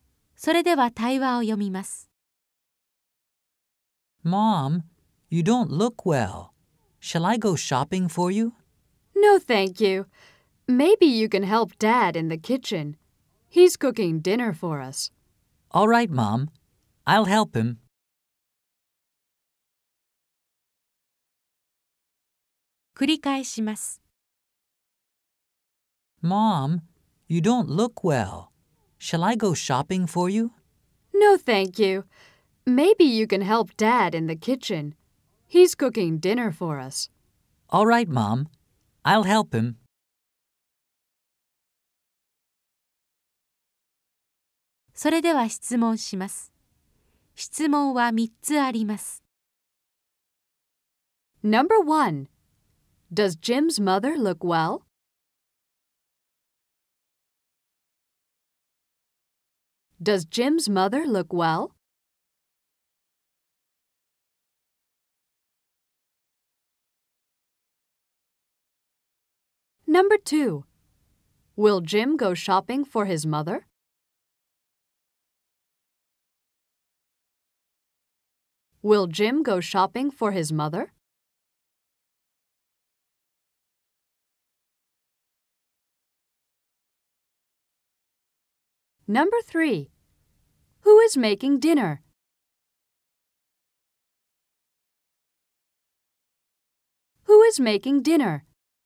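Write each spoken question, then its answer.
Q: Does Jim's mother look well?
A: No, she doesn't.

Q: Will Jim go shopping for his mother?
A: No, he won't.

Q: Who is making dinner?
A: Jim's father is.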